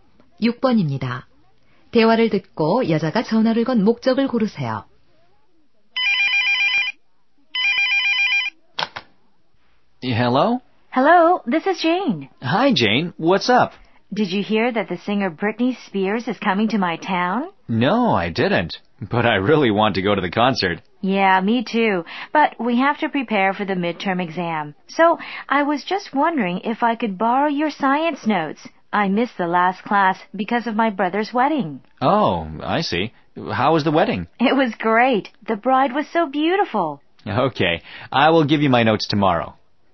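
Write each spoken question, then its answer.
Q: 대화를 듣고 여자가 전화를 건 목적을 고르세요.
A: 과학 노트를 빌리려고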